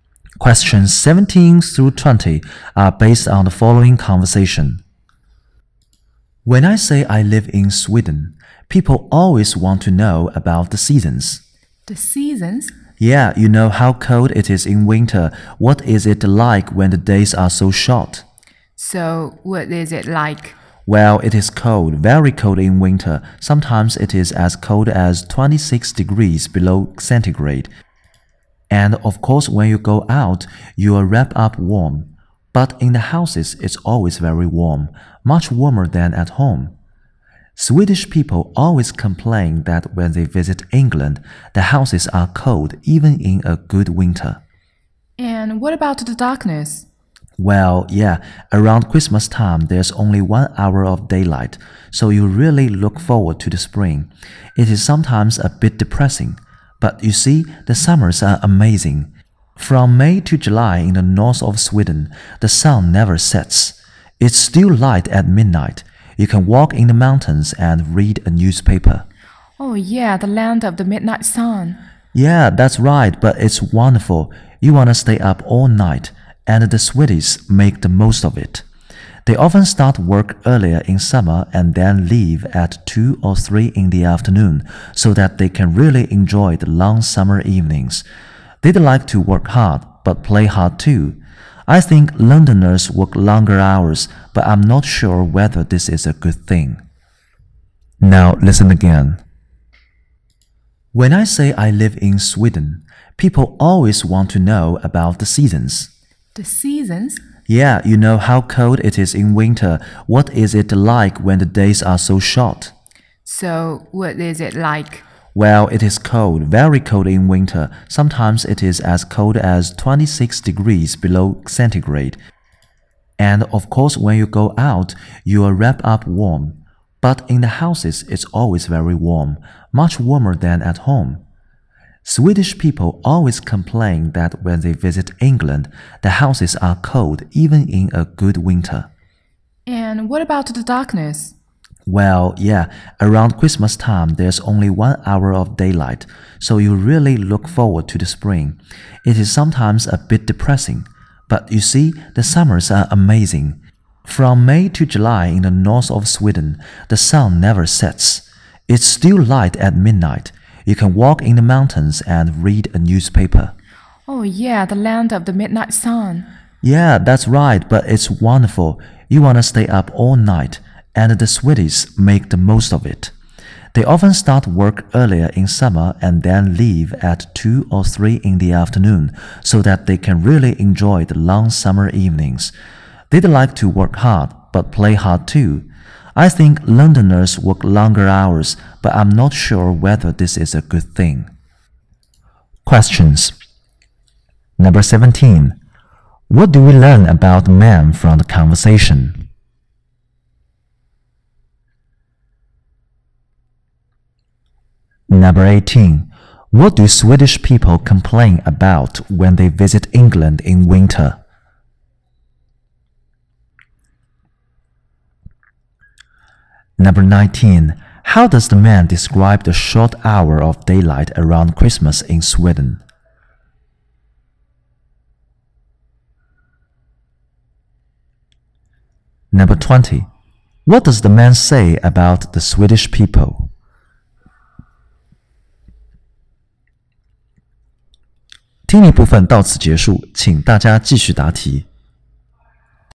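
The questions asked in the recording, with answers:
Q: What do Swedish people complain about when they visit England in winter?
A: The houses are cold

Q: How does the man describe the short hour of daylight around Christmas in Sweden?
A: It is sometimes a bit depressing

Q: What does the man say about the Swedish people?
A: They like to work hard and play hard too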